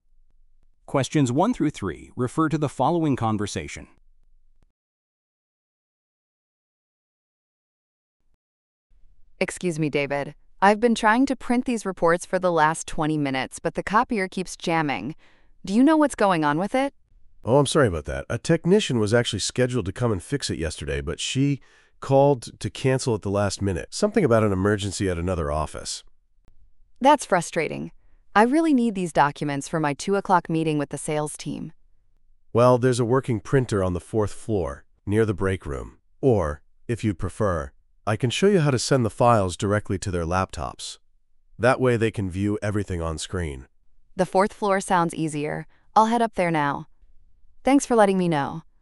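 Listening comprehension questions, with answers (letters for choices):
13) What are the speakers discussing?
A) A malfunctioning machine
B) A software update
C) A missing document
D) A scheduling conflict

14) When was the technician scheduled to arrive?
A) Earlier that morning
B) The previous day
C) The following week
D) Two days ago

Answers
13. A
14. B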